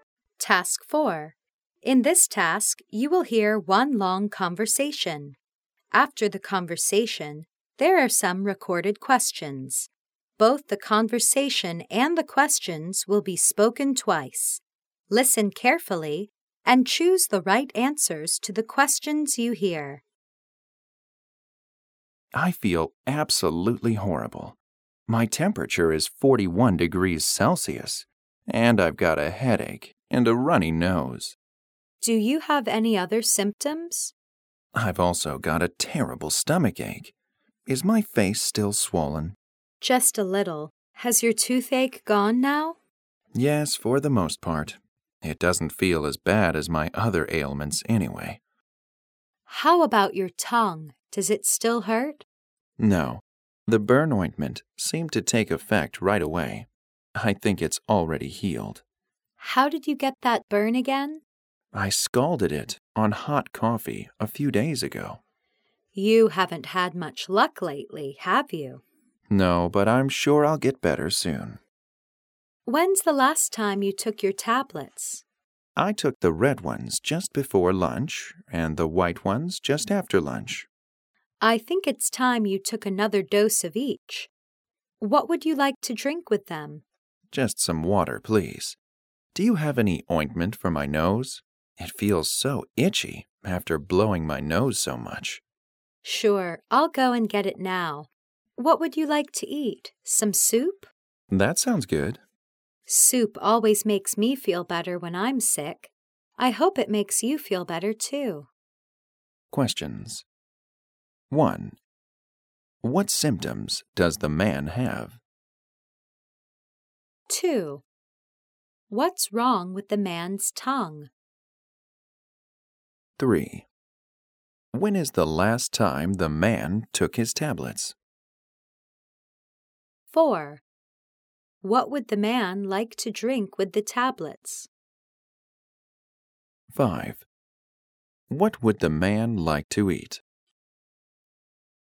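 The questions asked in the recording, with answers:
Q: What symptoms does the man have?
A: A high temperature (41°C), a headache, a runny nose and a stomach ache

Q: What's wrong with the man's tongue?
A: He burned it on hot coffee, but it has already healed

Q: When is the last time the man took his tablets?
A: Around lunch: red ones before lunch, white ones after

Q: What would the man like to drink with the tablets?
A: Water

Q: What would the man like to eat?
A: Soup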